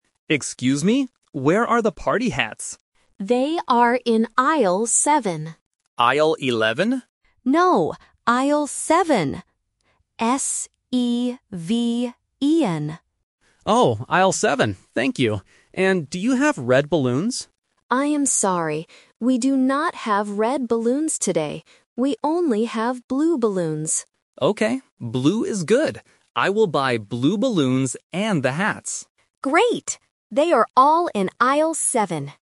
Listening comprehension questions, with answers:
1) What does the customer ask for first?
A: Party hats

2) Where are the party hats?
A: Aisle 7

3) What color balloons does the supermarket have?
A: Blue

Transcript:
Customer: Excuse me. Where are the party hats?
Cashier: They are in Aisle 7.
Customer: Aisle 11?
Cashier: No, Aisle 7. S-E-V-E-N.
Customer: Oh, Aisle 7. Thank you. And do you have red balloons?
Cashier: I am sorry. We do not have red balloons today. We only have blue balloons.
Customer: Okay. Blue is good. I will buy blue balloons and the hats.